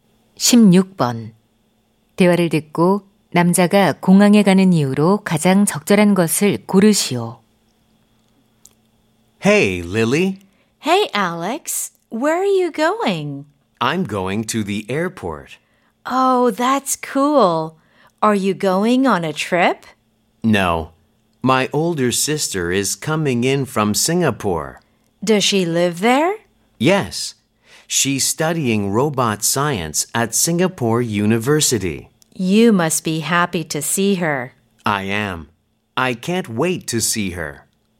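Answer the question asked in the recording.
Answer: 싱가포르에서 오는 누나를 마중하려고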